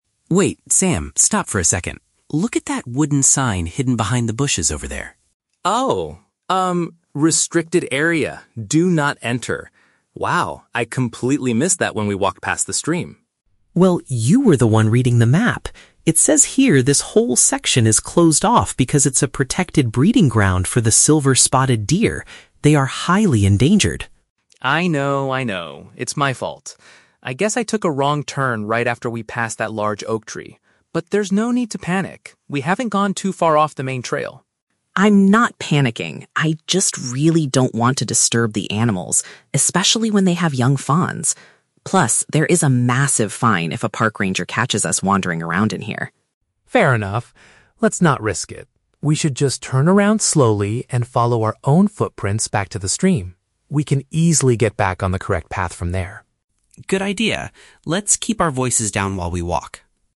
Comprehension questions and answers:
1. How did the hikers end up in the restricted zone?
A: The person responsible for the map made a navigation mistake.

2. Why is this specific area closed to the public?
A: It is a designated safe space for a rare animal species to reproduce.

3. What do the hikers agree to do next?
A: Quietly retrace their steps using the marks they left on the ground.

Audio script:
Alex: Wait, Sam, stop for a second. Look at that wooden sign hidden behind the bushes over there.
"Restricted Area. Do Not Enter." Wow, I completely missed that when we walked past the stream.
Alex: Well, you were the one reading the map! It says here this whole section is closed off because it's a protected breeding ground for the silver-spotted deer. They are highly endangered.
Sam: I know, I know. It's my fault. I guess I took a wrong turn right after we passed that large oak tree. But there's no need to panic. We haven't gone too far off the main trail.
Alex: I'm not panicking, I just really don't want to disturb the animals, especially when they have young fawns. Plus, there is a massive fine if a park ranger catches us wandering around in here.
Sam: Fair enough. Let's not risk it. We should just turn around slowly and follow our own footprints back to the stream. We can easily get back on the correct path from there.